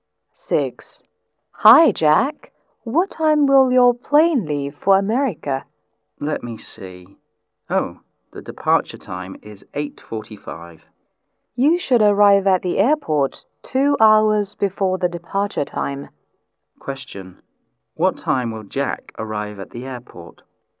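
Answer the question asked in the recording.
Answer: At 6:45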